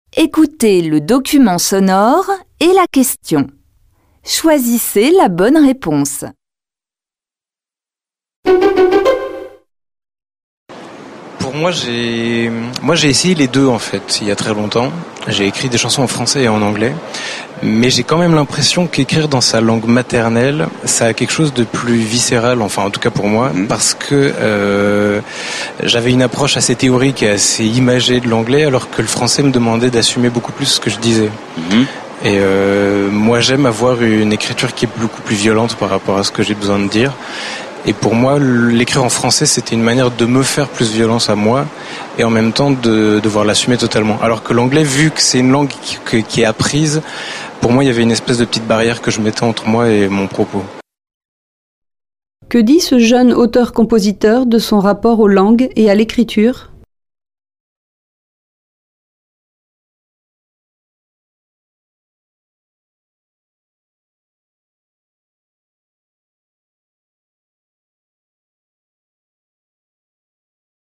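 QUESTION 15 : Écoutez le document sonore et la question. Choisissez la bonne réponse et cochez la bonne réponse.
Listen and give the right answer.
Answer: Écrire en français, sa langue maternelle, est plus viscéral et l'oblige à assumer ses propos; l'anglais crée une distance.

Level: Tăng dần từ trình độ A1 đến C1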